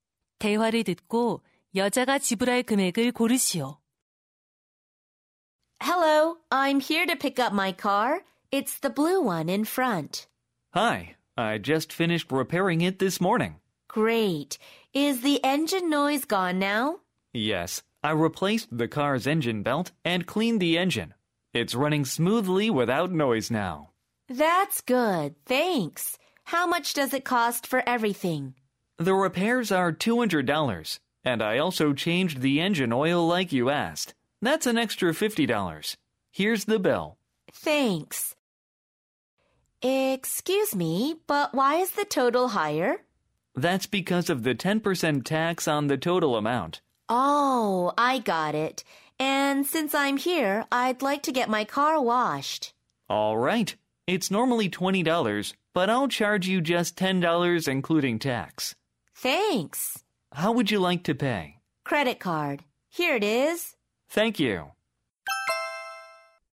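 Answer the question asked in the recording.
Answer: $285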